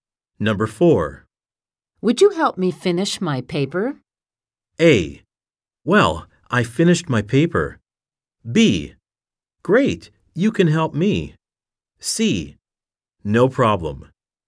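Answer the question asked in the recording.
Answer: C: No problem.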